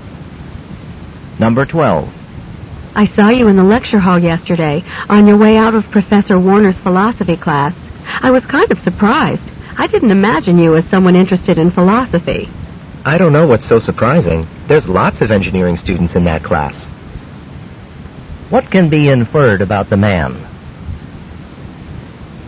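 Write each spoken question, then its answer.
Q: What can be inferred about the man?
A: He is an engineering student taking the philosophy class.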